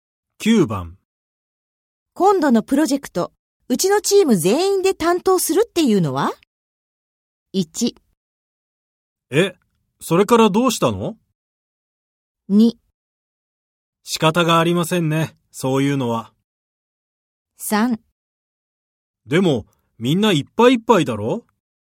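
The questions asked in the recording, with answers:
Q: 今度のプロジェクト、うちのチーム全員で担当するっていうのは?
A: 3: でも、みんないっぱいいっぱいだろ?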